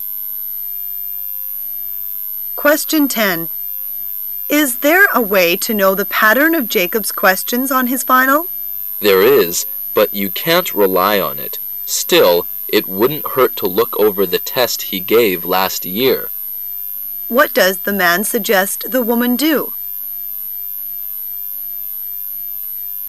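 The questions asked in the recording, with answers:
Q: What does the man suggest the woman do?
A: Look over the test Jacob gave last year.

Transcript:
[解析] W: Is there a way to know the pattern of Jacob's questions on his final? M: There is, but you can't rely on it. Still, it wouldn't hurt to look over the test he gave last year. Q: What does the man suggest the woman do?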